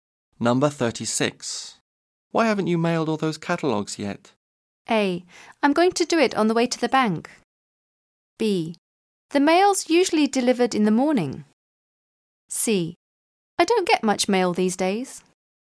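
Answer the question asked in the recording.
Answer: A: I'm going to do it on the way to the bank.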